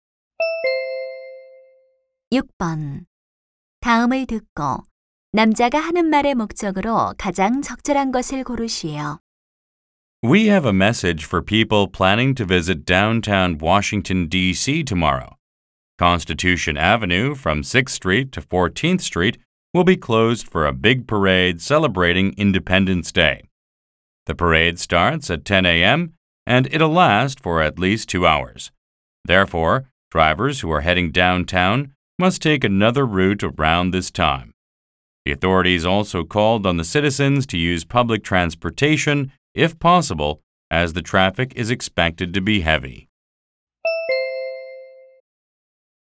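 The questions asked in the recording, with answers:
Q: 다음을 듣고 남자가 하는 말의 목적으로 가장 적절한 것을 고르시오.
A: 퍼레이드로 인한 도로 통제를 알리고 우회를 당부하려고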